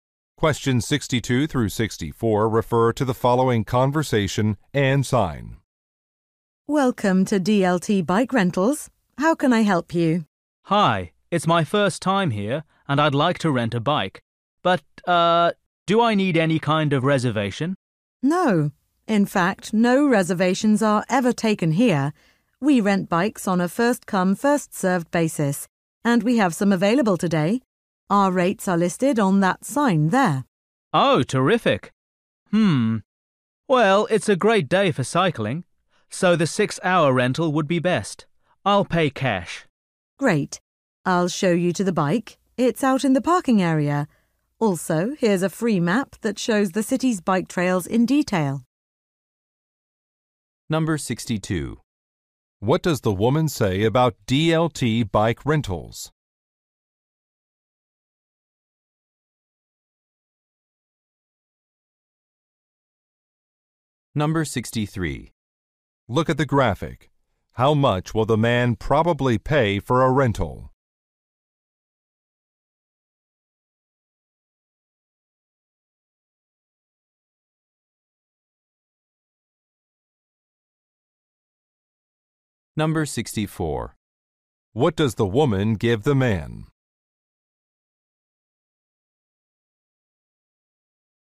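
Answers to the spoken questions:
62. It does not take reservations
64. A free map of bike trails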